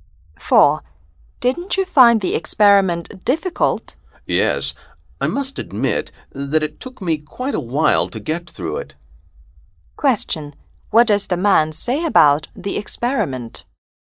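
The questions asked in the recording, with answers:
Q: What does the man say about the experiment?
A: It was difficult and took him quite a while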